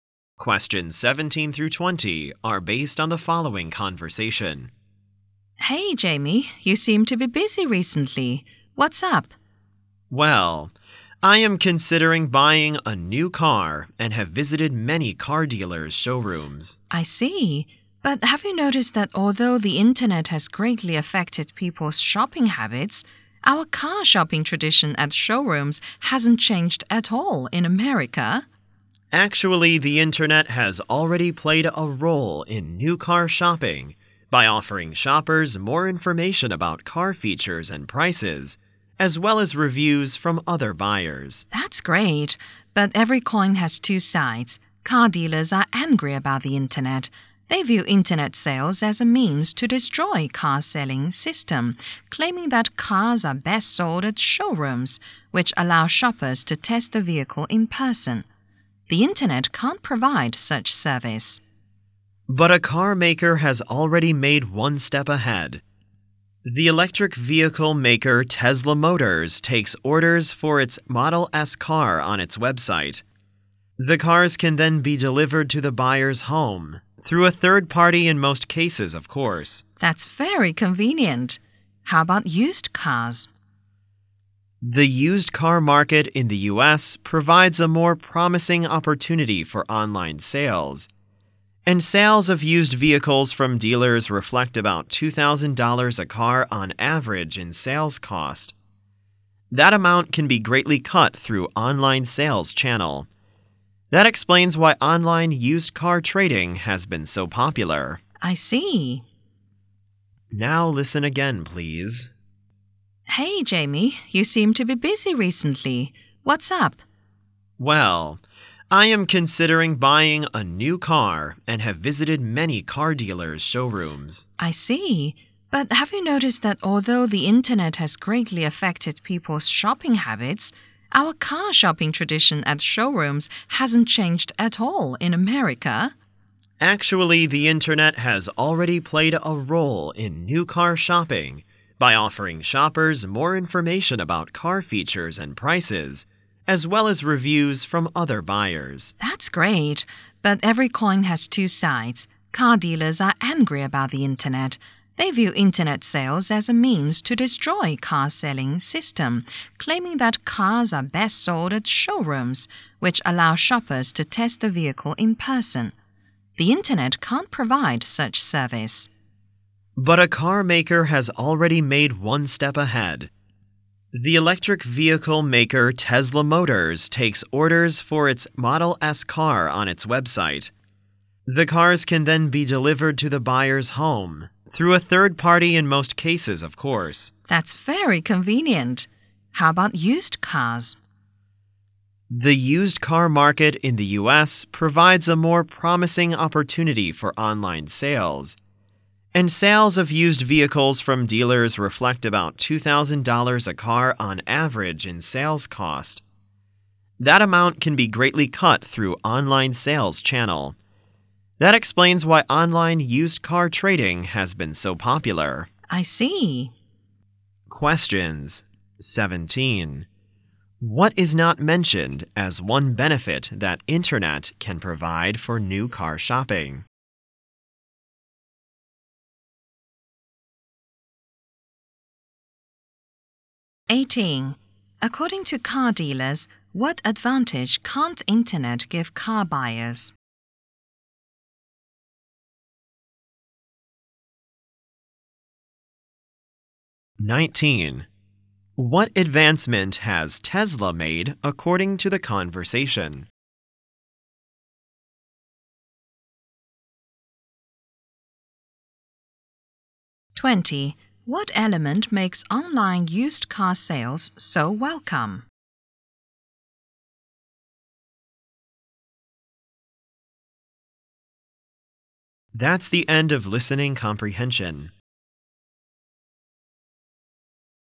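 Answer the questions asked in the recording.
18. Testing the vehicle in person.
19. It takes orders for its Model S on its website and delivers cars to buyers' homes.
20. Online sales greatly cut the roughly $2,000-per-car sales cost.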